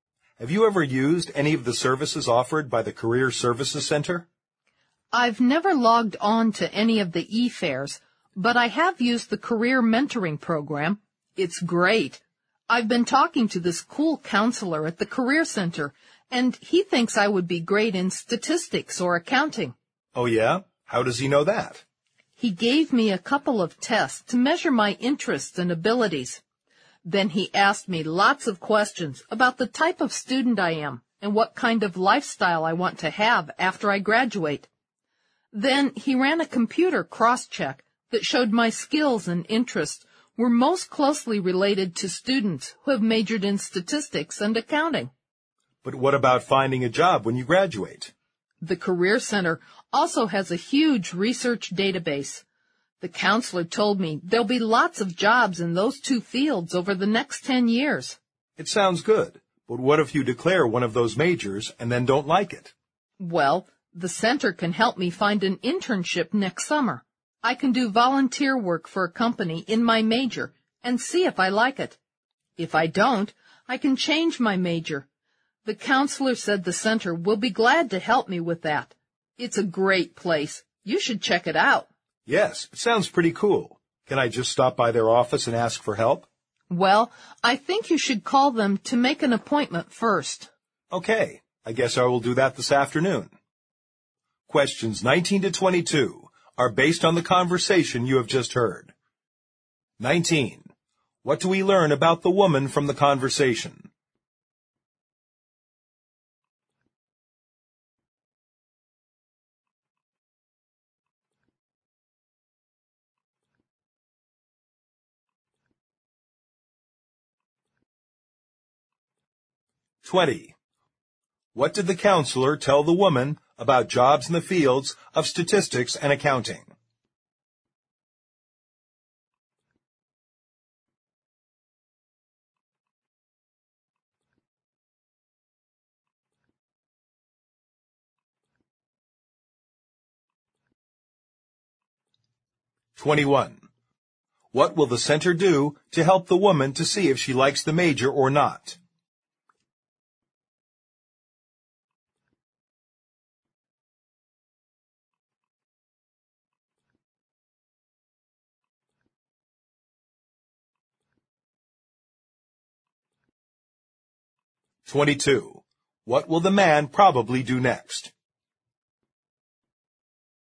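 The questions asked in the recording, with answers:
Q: What did the counselor tell the woman about jobs in the fields of statistics and accounting?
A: There will be lots of jobs in those fields over the next 10 years.

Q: What will the center do to help the woman to see if she likes the major or not?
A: Help her find an internship next summer.

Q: What will the man probably do next?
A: Call the center to make an appointment.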